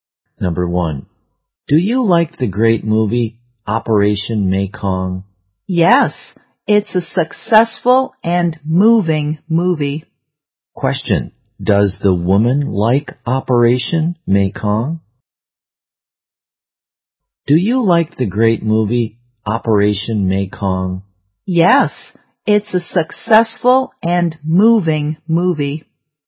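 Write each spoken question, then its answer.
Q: Question,Does the woman like Operation Mekong?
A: Yes, she does.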